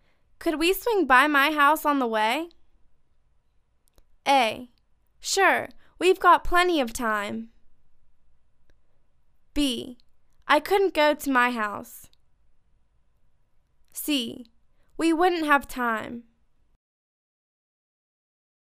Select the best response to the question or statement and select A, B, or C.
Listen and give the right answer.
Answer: Sure, we've got plenty of time.